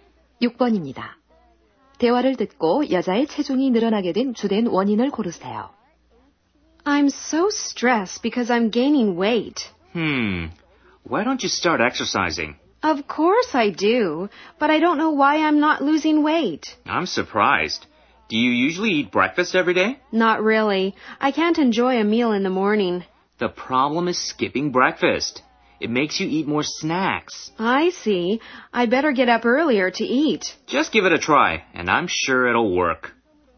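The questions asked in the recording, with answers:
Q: 대화를 듣고 여자의 체중이 늘어나게 된 주된 원인을 고르세요.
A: 아침 식사를 거르는 것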